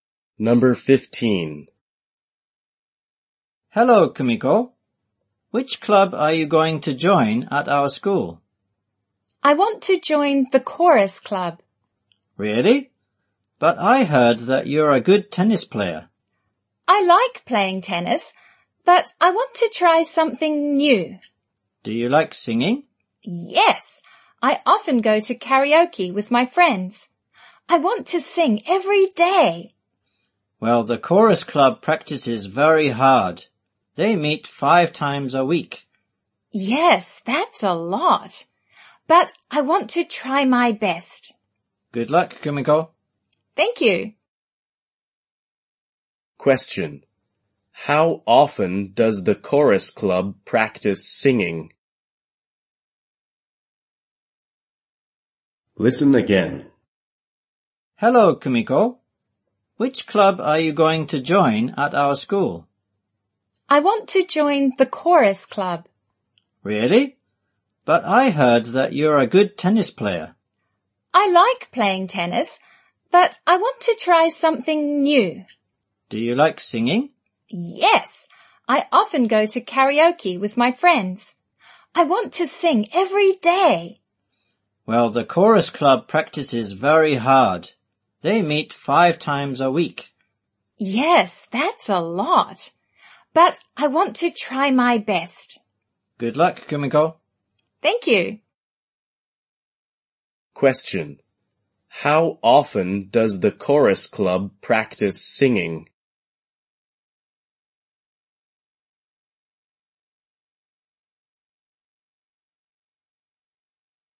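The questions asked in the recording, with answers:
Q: How often does the chorus club practice singing?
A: 5 times a week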